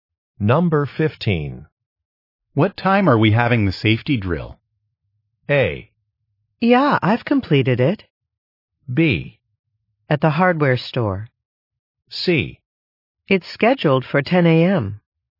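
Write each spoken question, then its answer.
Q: What time are we having the safety drill?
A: C: It's scheduled for 10 a.m.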